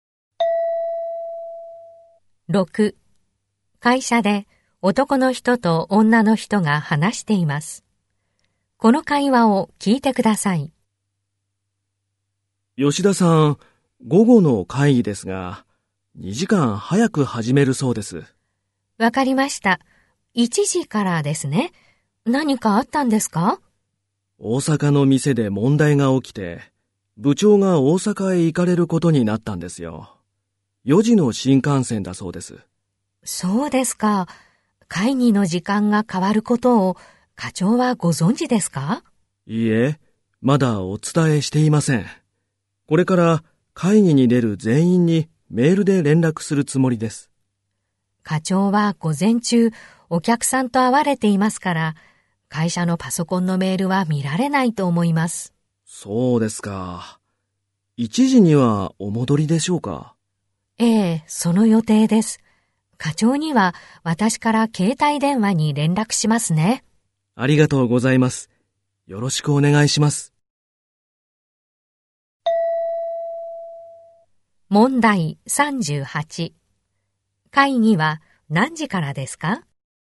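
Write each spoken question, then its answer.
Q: 会議は何時からですか?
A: 1時から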